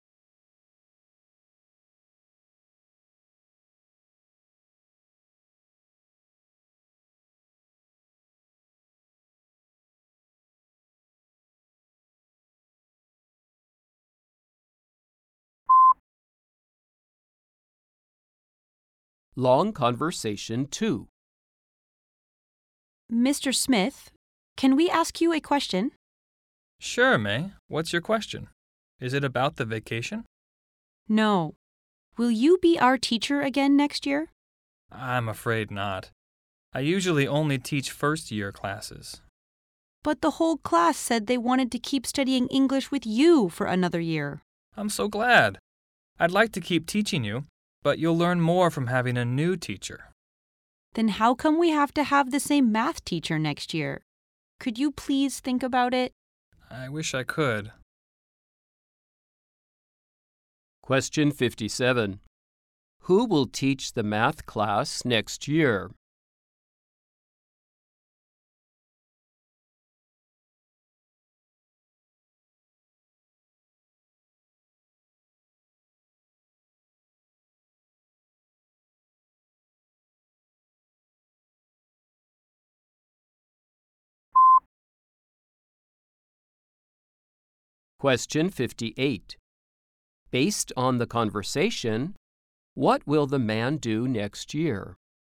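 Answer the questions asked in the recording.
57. The same math teacher as this year
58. Teach first-year classes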